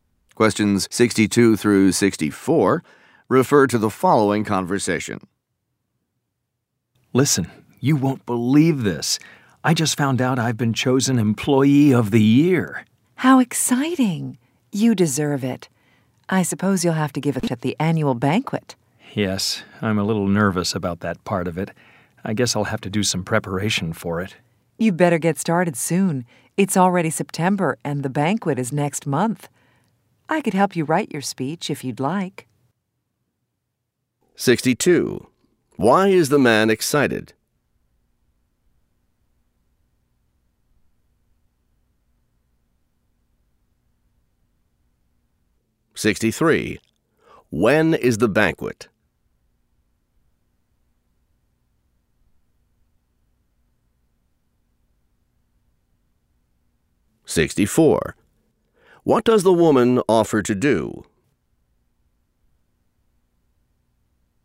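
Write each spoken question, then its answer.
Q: Why is the man excited?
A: He was chosen Employee of the Year

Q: When is the banquet?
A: Next month (October)

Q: What does the woman offer to do?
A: Help him write his speech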